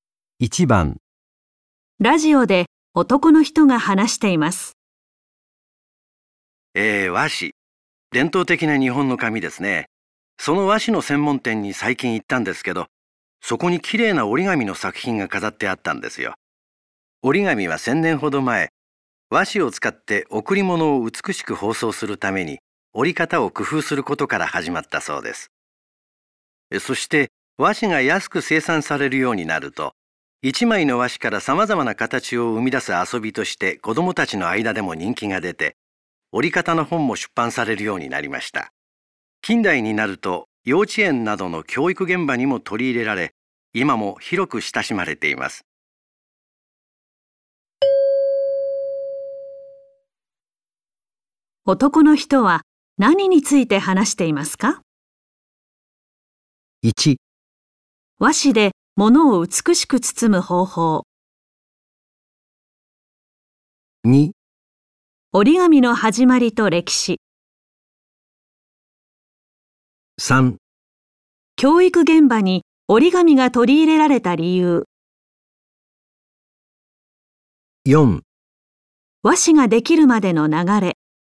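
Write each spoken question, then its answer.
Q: 男の人は何について話していますか?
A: 2: 折り紙の始まりと歴史。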